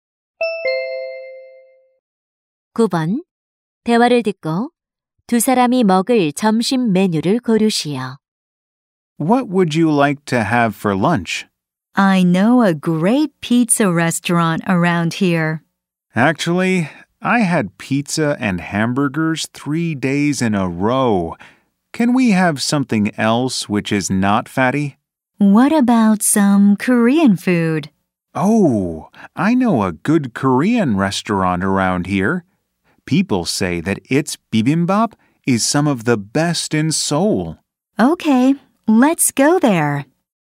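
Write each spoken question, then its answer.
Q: 대화를 듣고 두 사람이 먹을 점심 메뉴를 고르시오.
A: 비빔밥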